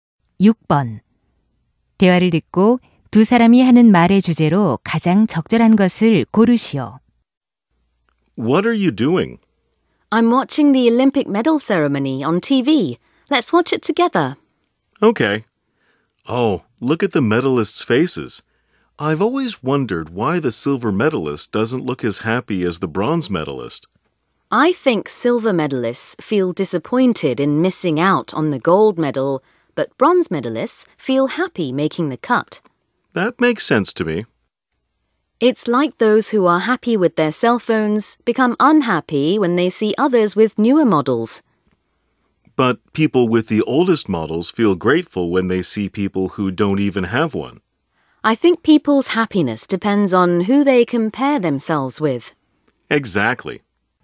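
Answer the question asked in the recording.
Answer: 행복은 누구와 비교하느냐에 달려 있다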